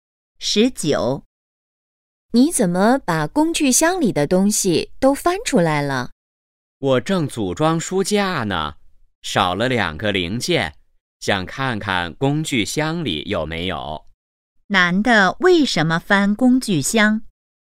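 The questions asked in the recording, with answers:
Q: 男的为什么翻工具箱?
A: 找书架的零件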